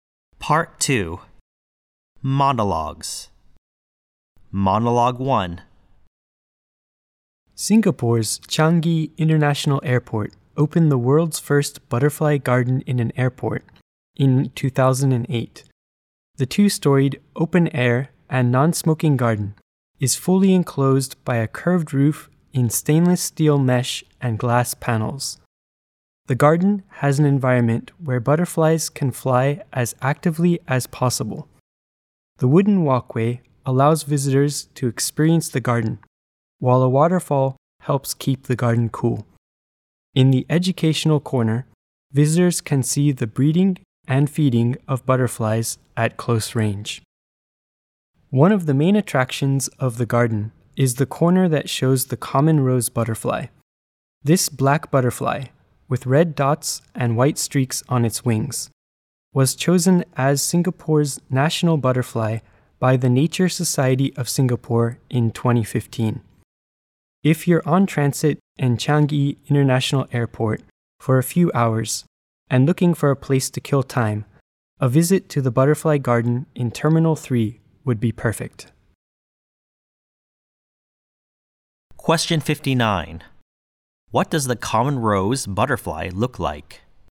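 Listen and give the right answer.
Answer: Black, with red dots and white streaks on its wings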